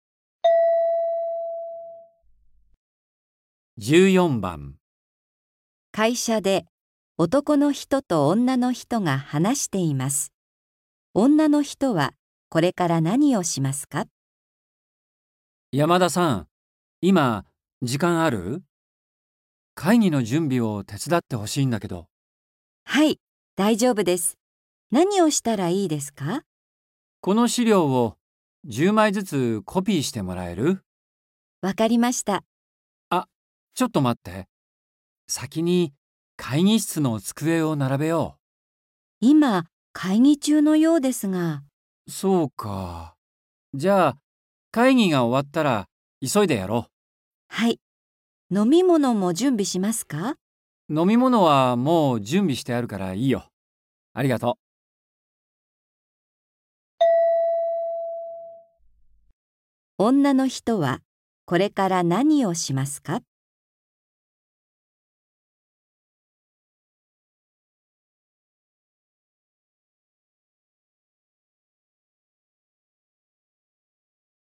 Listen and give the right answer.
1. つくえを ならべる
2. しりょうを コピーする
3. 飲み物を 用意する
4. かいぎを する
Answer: 2. しりょうを コピーする

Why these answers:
M:山田さん、今、時間ある?会議の準備を手伝ってほしいんだけど。 F:はい、大丈夫です。何をしたらいいですか。 M:この資料を10枚ずつコピーしてもらえる? F:わかりました。 M:あ、ちょっと待って。先に会議室の机を並べよう。 F:今、会議中よろしくですが。 M:そうか。じゃ、会議が終わったら、急いでやろう。 F:はい。飲み物も準備しますか。 M:飲み物はもう準備してるから、いいよ。ありがとう。

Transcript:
M:あ、ちょっと待って。先に会議室の机を並べよう。
F:今、会議中よろしくですが。
M:そうか。じゃ、会議が終わったら、急いでやろう。
F:はい。飲み物も準備しますか。
M:飲み物はもう準備してるから、いいよ。ありがとう。
女の人は、それから何をしますか。

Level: N4